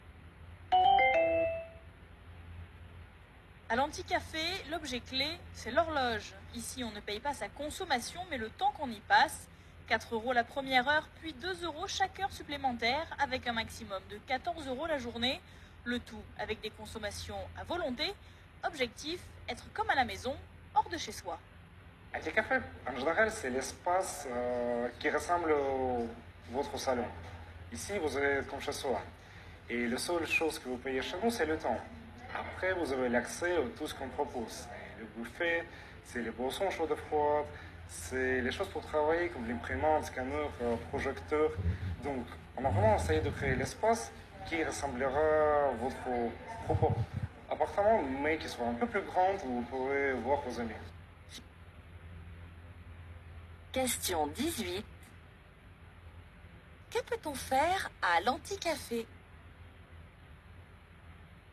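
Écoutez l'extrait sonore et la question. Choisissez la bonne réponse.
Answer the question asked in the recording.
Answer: Consommer à volonté, travailler et voir ses amis en payant le temps passé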